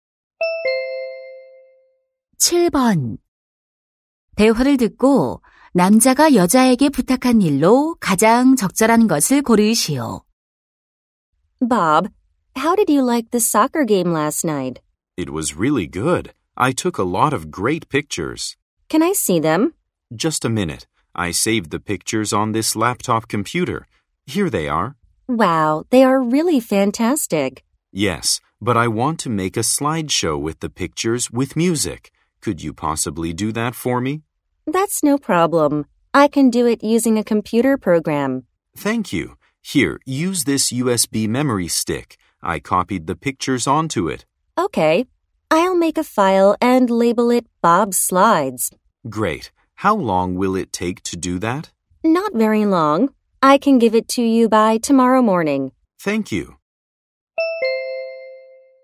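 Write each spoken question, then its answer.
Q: 대화를 듣고 남자가 여자에게 부탁한 일로 가장 적절한 것을 고르시오.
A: 사진으로 음악이 있는 슬라이드쇼 만들기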